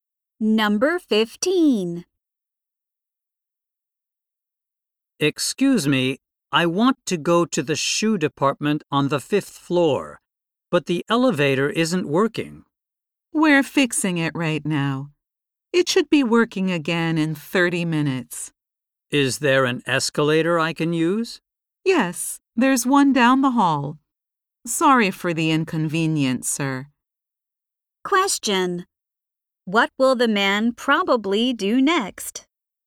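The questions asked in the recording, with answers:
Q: What will the man probably do next?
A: Use the escalator down the hall.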